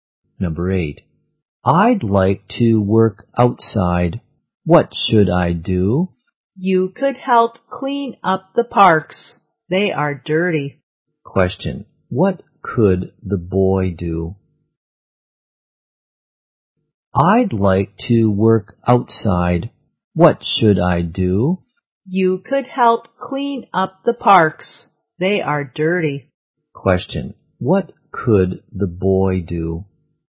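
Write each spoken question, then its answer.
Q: What could the boy do?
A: Help clean up the parks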